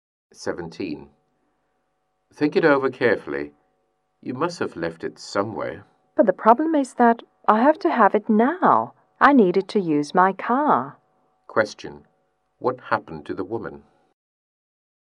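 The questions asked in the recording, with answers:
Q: What happened to the woman?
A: She lost her car key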